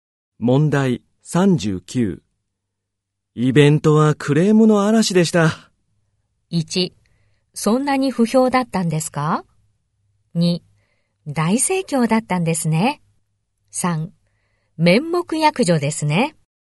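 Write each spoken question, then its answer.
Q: イベントはクレームの嵐でした。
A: 1: そんなに不評だったんですか?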